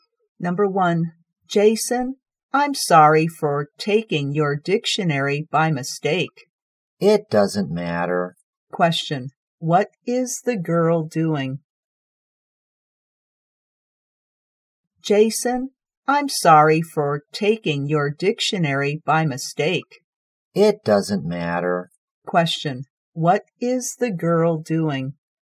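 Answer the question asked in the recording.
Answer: Apologizing to Jason for taking his dictionary by mistake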